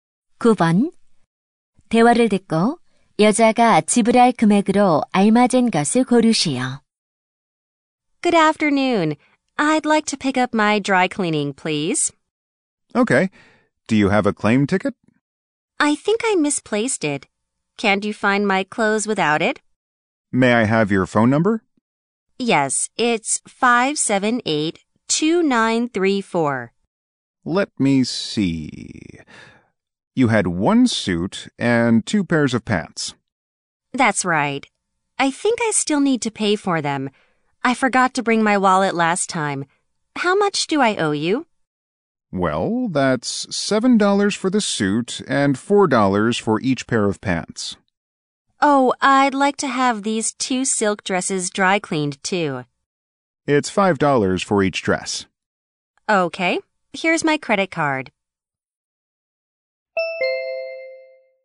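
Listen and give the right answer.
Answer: $25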